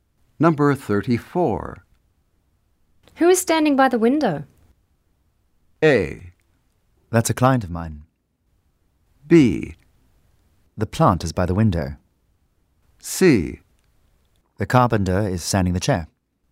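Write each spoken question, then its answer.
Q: Who is standing by the window?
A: A: That's a client of mine.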